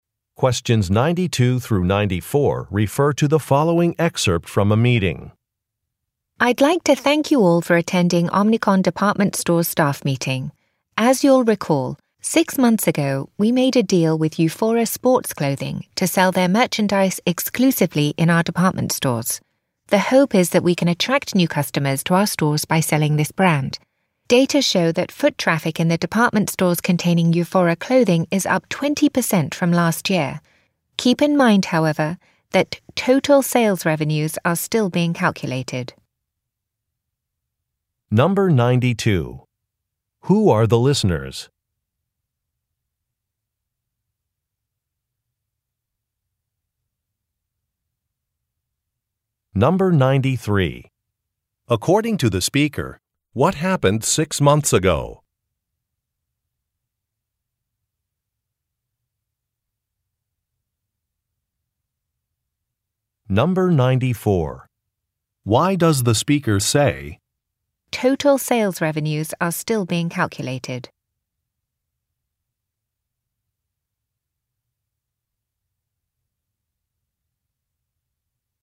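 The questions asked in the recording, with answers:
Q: Who are the listeners?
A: Omnicom Department Store staff

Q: According to the speaker, what happened 6 months ago?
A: A deal was made with Euphora Sports Clothing to sell its merchandise exclusively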